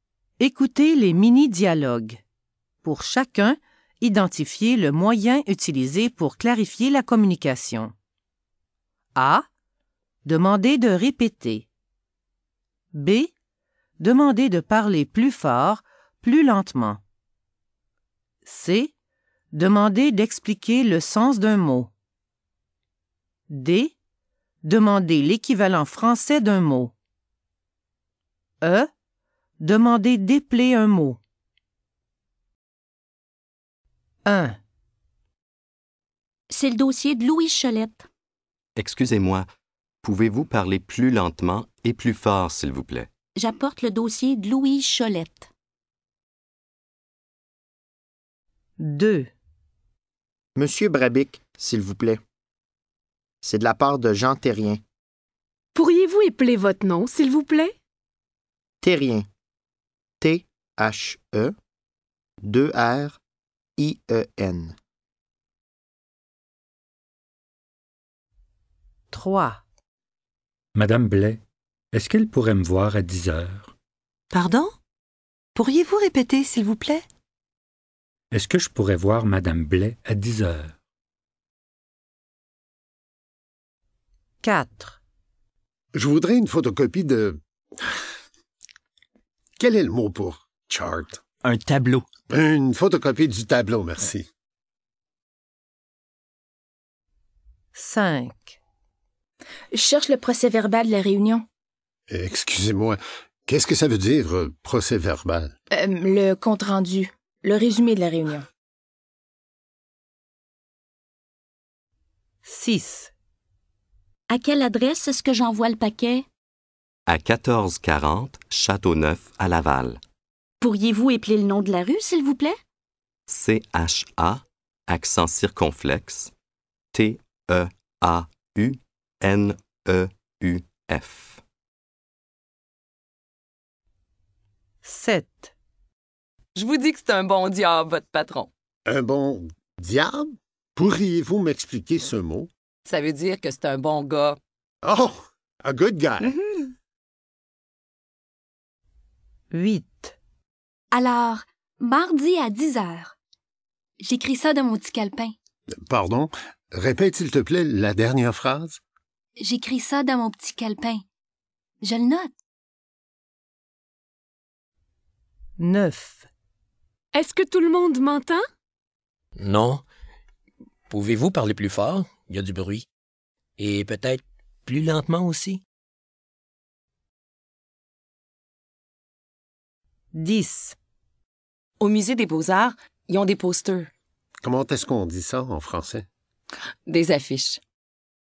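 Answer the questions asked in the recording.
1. B: Demandez de parler plus fort, plus lentement.
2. E: Demandez d'épeler un mot.
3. A: Demandez de répéter.
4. D: Demandez l'équivalent français d'un mot.
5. C: Demandez d'expliquer le sens d'un mot.
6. E: Demandez d'épeler un mot.
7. C: Demandez d'expliquer le sens d'un mot.
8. A: Demandez de répéter.
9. B: Demandez de parler plus fort, plus lentement.
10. D: Demandez l'équivalent français d'un mot.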